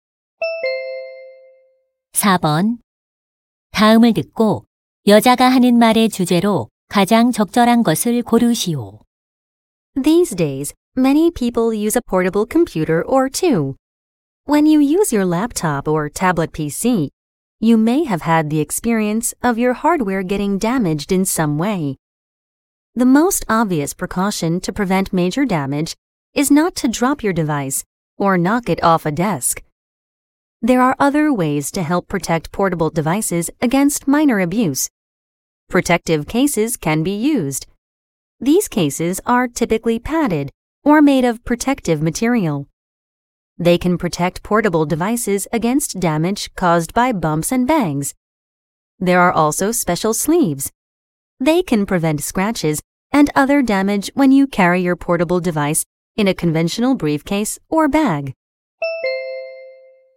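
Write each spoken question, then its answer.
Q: 다음을 듣고 여자가 하는 말의 주제로 가장 적절한 것을 고르시오.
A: 휴대용 기기를 손상으로부터 보호하는 방법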